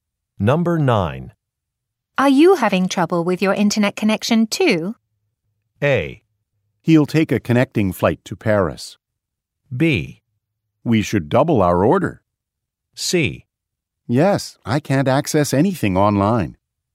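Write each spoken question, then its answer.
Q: Are you having trouble with your internet connection, too?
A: C: Yes, I can't access anything online.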